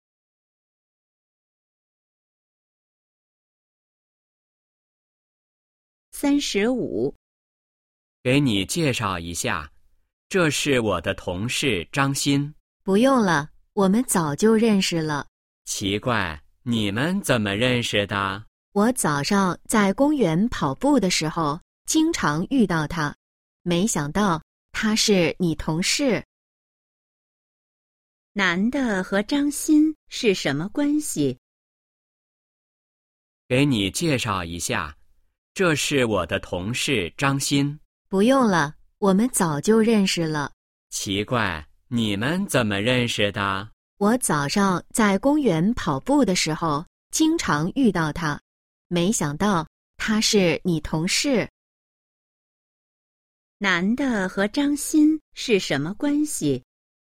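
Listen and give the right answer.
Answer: 早就认识,常在公园跑步时遇到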